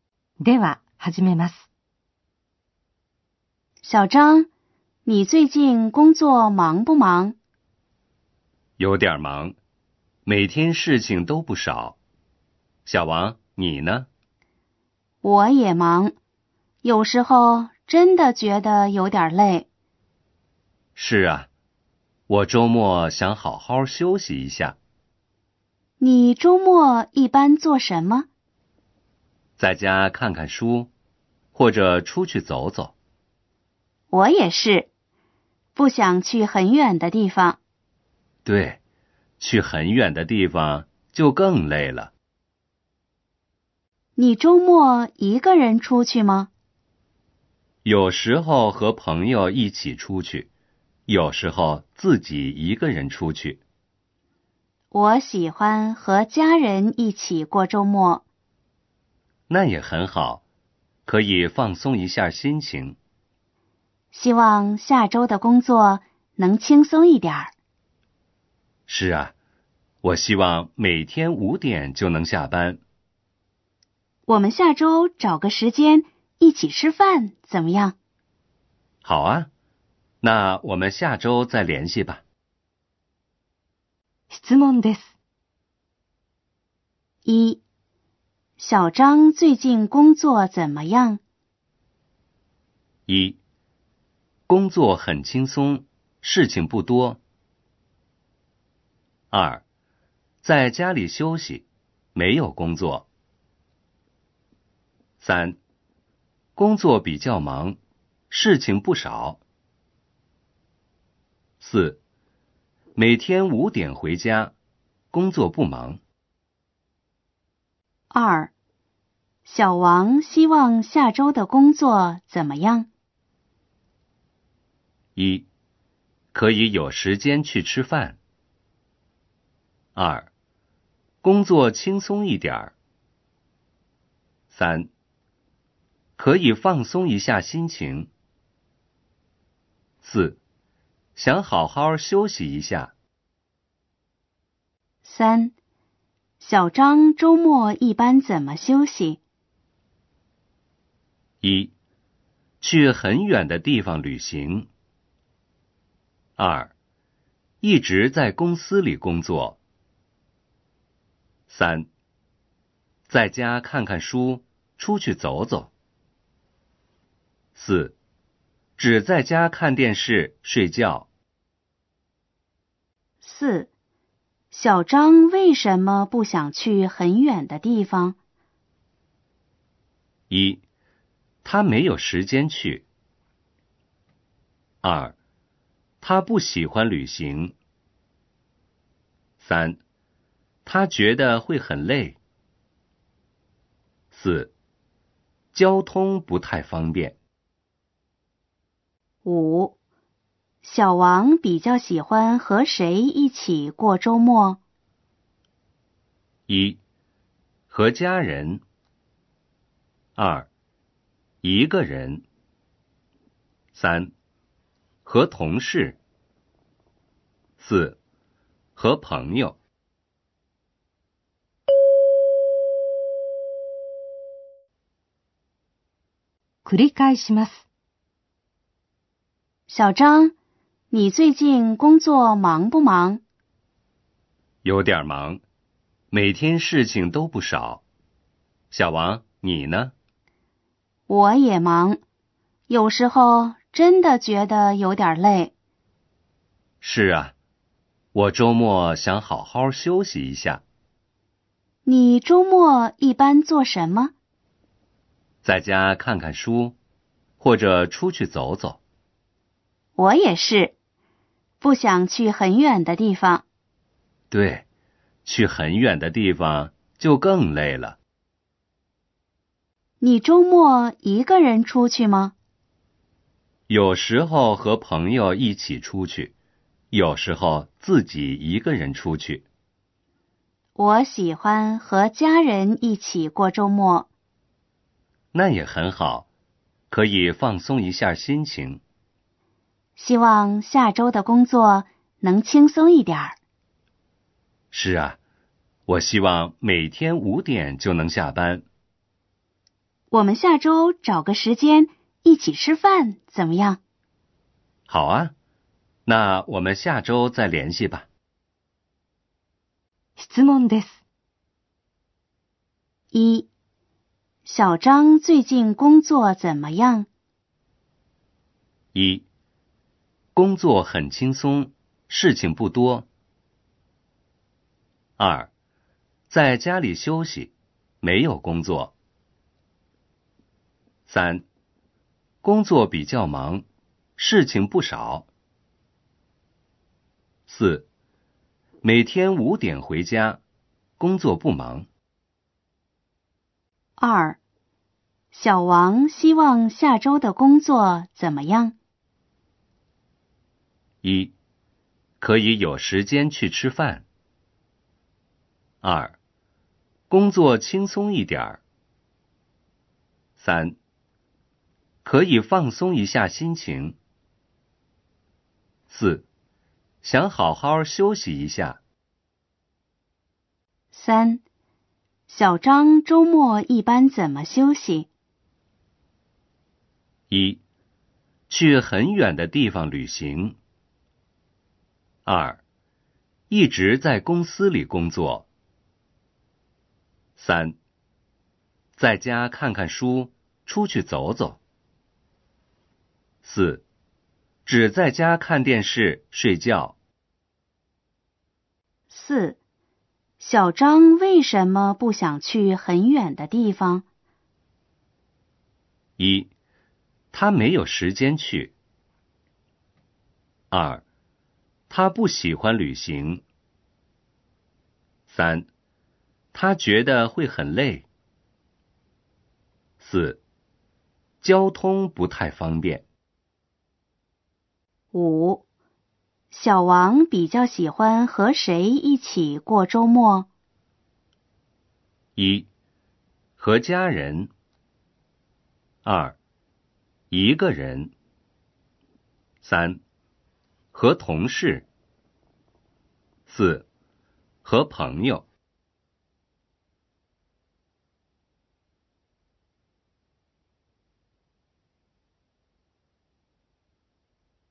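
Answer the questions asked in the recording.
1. 3: 工作比较忙,事情不少。
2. 2: 工作轻松一点。
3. 3: 在家看看书,出去走走。
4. 3: 他觉得会很累。
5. 1: 和家人。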